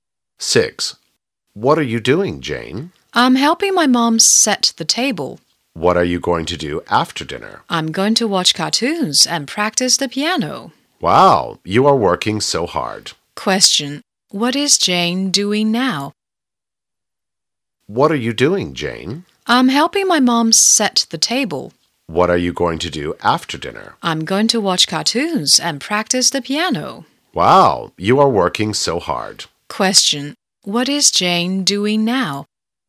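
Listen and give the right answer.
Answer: Helping her mom set the table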